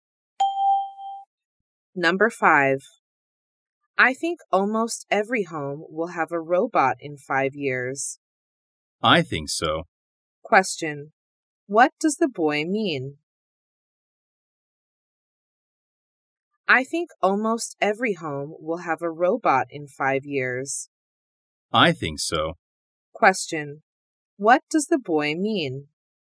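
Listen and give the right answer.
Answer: He agrees that almost every home will have a robot in 5 years.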